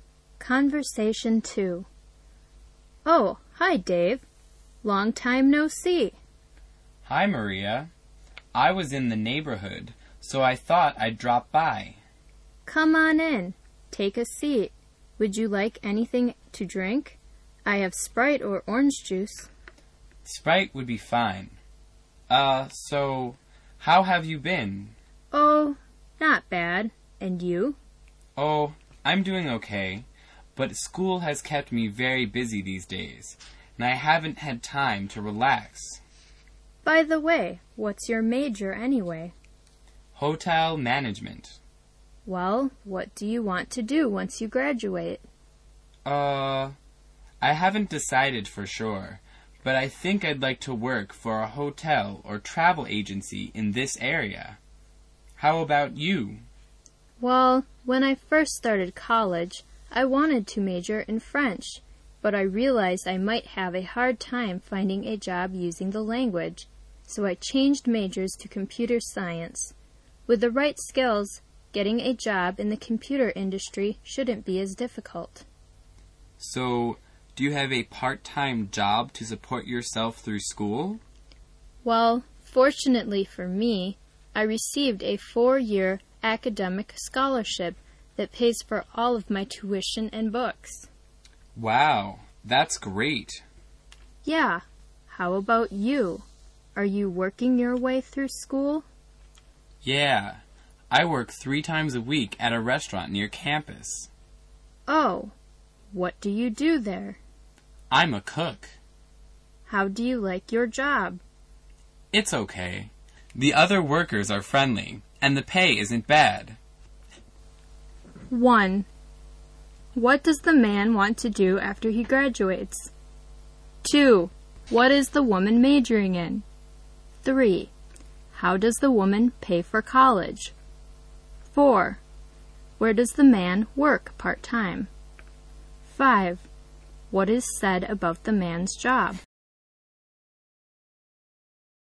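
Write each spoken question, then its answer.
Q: What does the man want to do after he graduates?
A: Work for a hotel or travel agency in the area

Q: What is the woman majoring in?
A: Computer science

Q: How does the woman pay for college?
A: With a 4-year academic scholarship

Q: Where does the man work part-time?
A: At a restaurant near campus

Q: What is said about the man's job?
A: The other workers are friendly and the pay isn't bad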